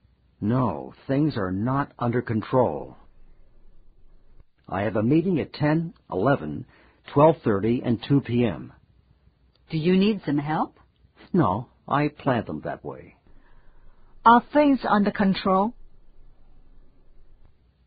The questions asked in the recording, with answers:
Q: Are things under control?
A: Yes, things are under control.